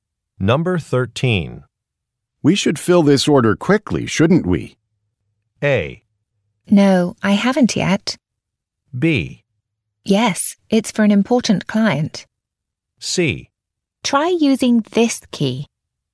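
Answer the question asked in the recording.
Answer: B: Yes, it's for an important client.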